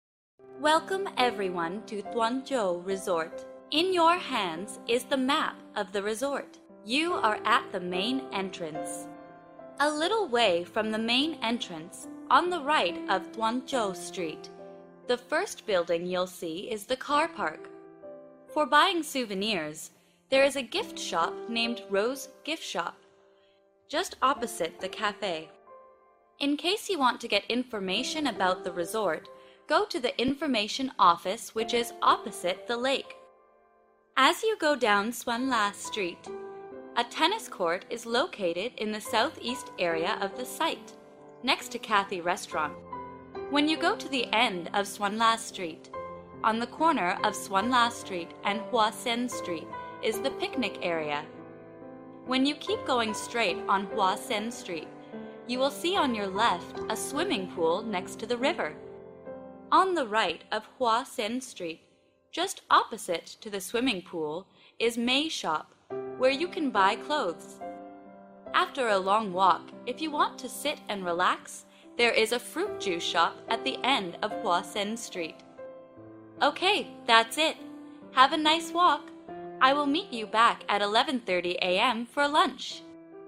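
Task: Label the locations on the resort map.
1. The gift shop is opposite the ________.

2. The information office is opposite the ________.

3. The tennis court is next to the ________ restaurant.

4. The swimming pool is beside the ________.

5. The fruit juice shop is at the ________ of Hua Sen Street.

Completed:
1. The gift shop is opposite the cafe.
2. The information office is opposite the lake.
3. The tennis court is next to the Cathay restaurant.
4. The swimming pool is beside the river.
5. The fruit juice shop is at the end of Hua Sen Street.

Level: lớp 8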